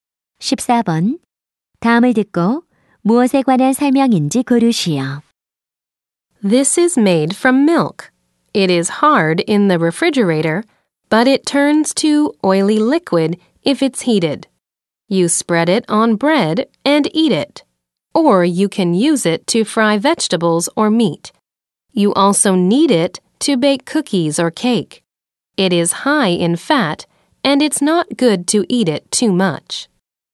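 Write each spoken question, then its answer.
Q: 14번. 다음을 듣고 무엇에 관한 설명인지 고르시오.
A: 버터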